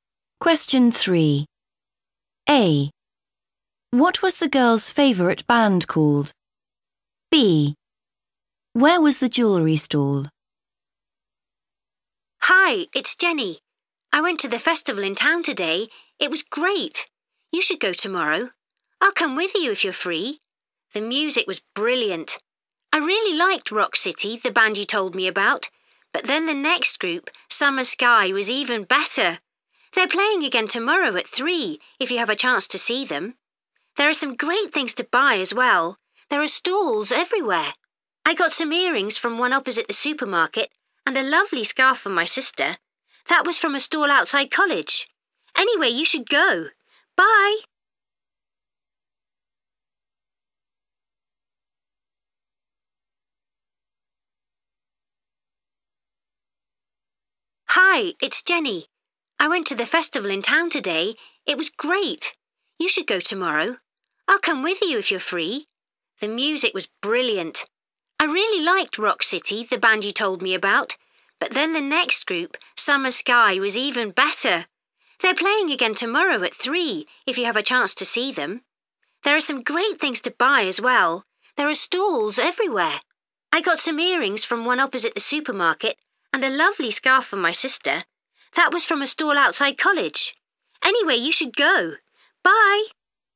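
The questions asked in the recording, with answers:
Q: What was the girl's favourite band called?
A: Summer Sky

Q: Where was the jewellery stall?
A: opposite the supermarket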